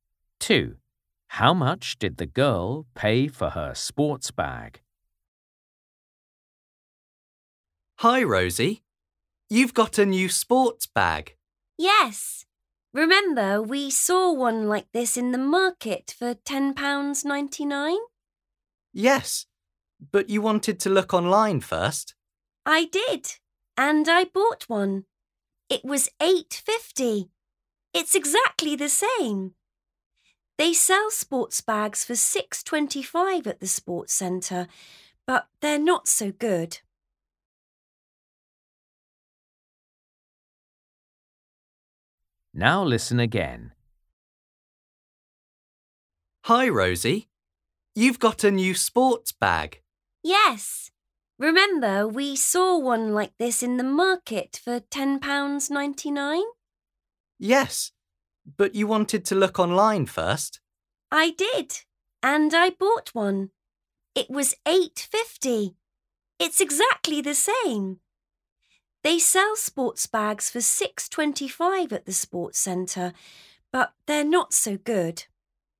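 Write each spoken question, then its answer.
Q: How much did the girl pay for her sports bag?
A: £8.50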